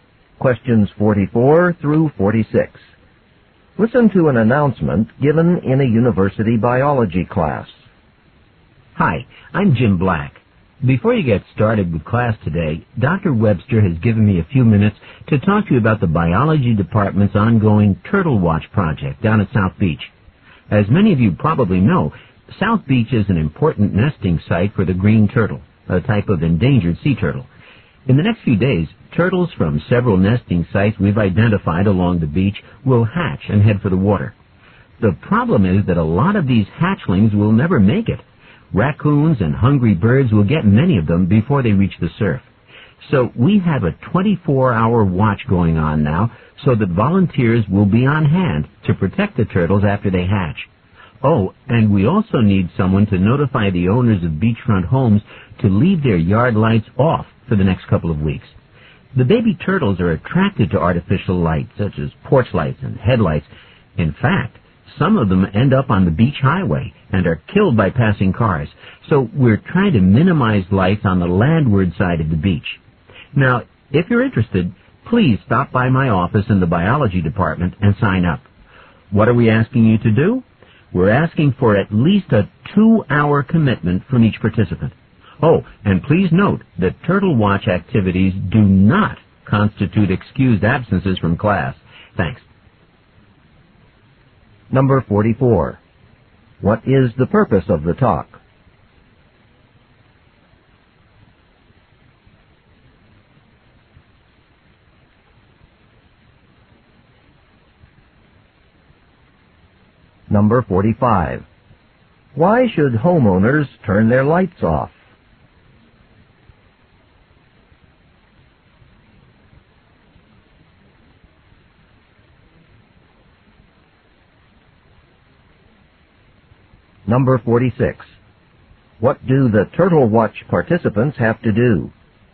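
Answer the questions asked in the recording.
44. To recruit volunteers for the Turtle Watch project.
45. Artificial light attracts baby turtles away from the water.
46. Commit to at least two hours.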